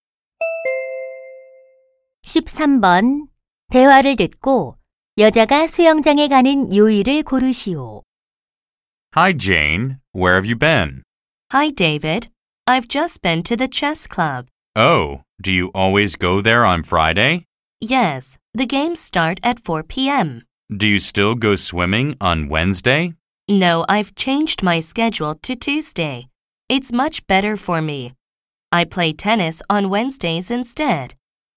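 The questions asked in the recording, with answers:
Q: 대화를 듣고 여자가 수영장에 가는 요일을 고르시오.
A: 화요일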